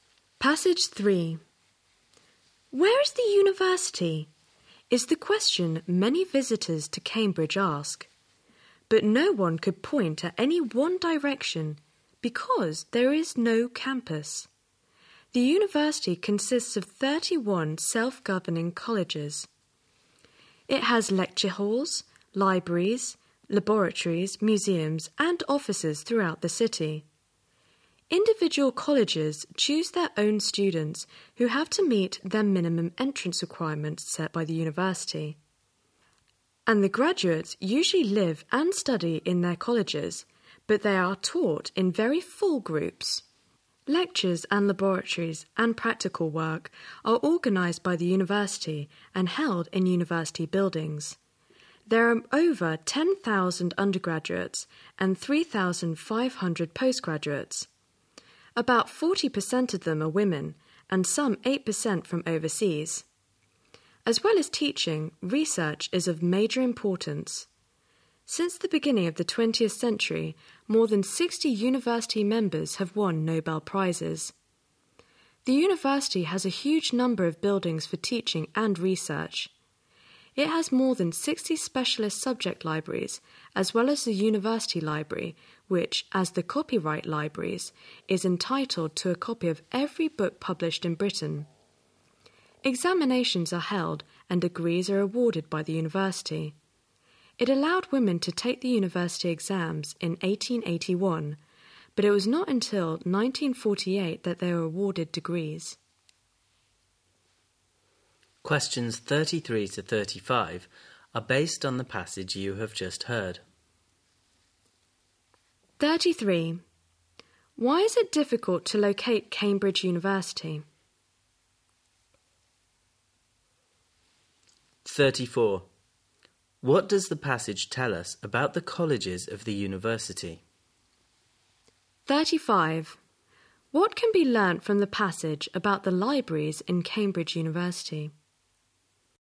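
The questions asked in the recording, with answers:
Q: Why is it difficult to locate Cambridge University?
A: It has no campus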